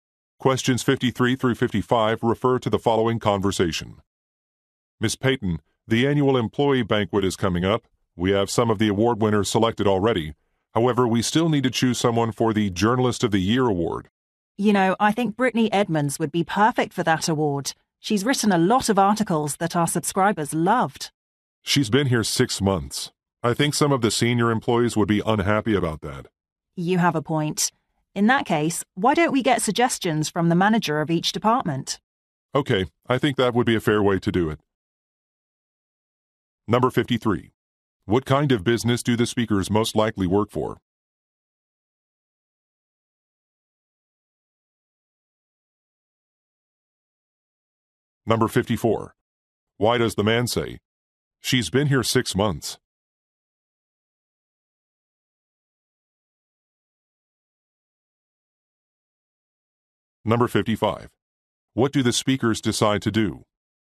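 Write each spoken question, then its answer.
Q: What kind of business do the speakers most likely work for?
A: A newspaper or magazine publisher

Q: Why does the man say, "She's been here 6 months"?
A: She is too new to receive the award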